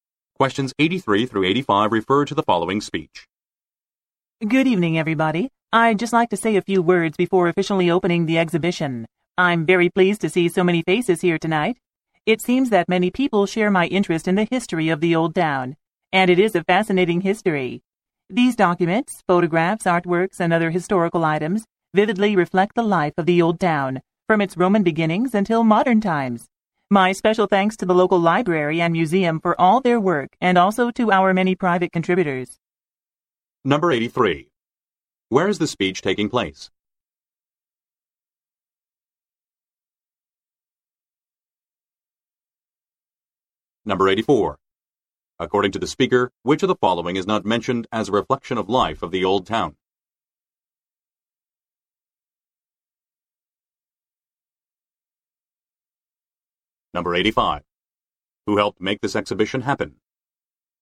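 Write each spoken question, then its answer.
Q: Where is the speech taking place?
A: At the opening of an exhibition about the history of the Old Town

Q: Who helped make this exhibition happen?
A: The local library and museum, and private contributors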